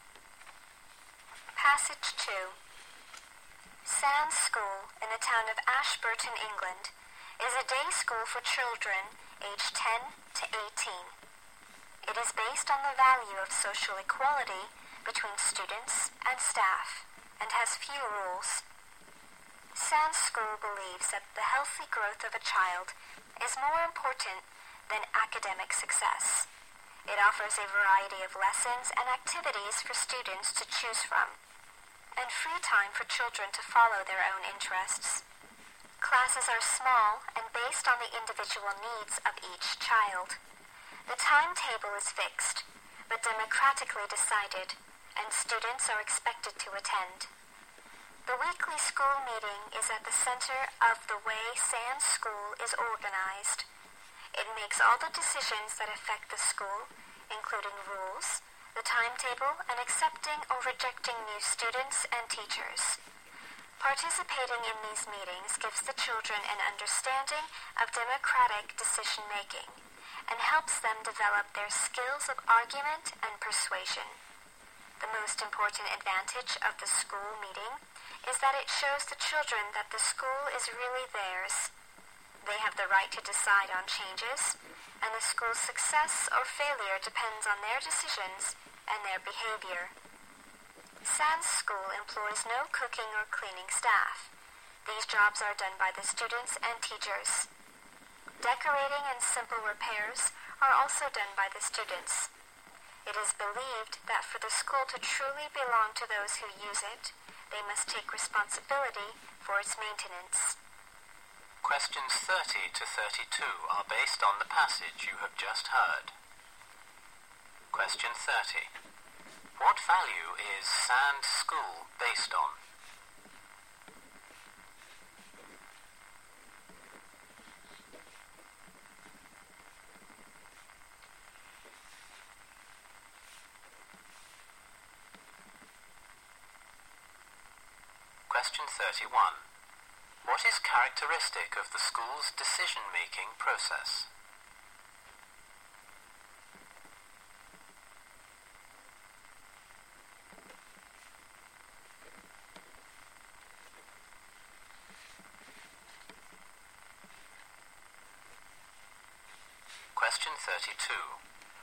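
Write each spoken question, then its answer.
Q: What value is Sands School based on?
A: Social equality between students and staff.

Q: What is characteristic of the school's decision-making process?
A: It is democratic: all decisions are made at the weekly school meeting.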